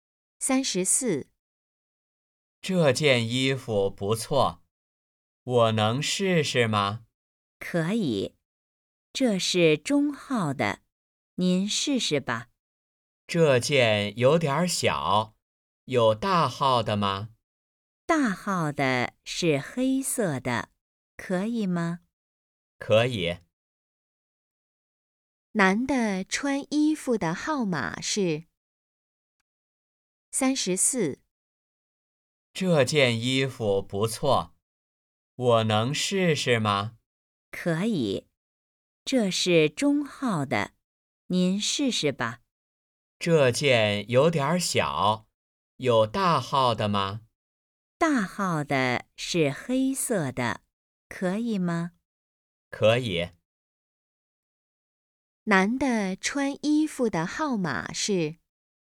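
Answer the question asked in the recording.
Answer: 大号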